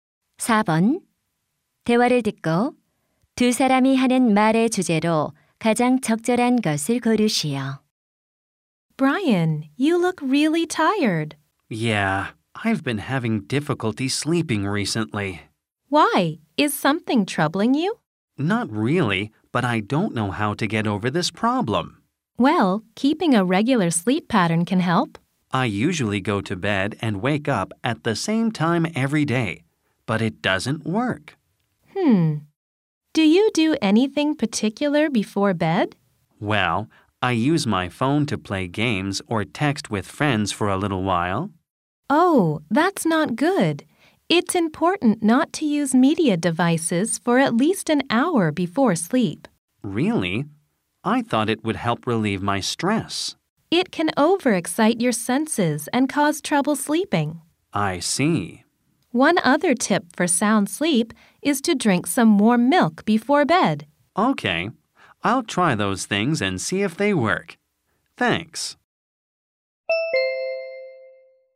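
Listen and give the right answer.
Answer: 숙면을 위한 방법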